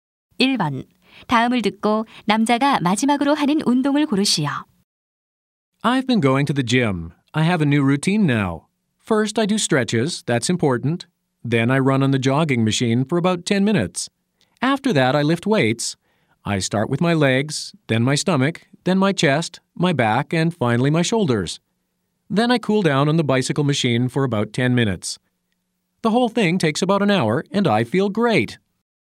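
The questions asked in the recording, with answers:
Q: 다음을 듣고 남자가 마지막으로 하는 운동을 고르시오.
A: 자전거 기계로 정리 운동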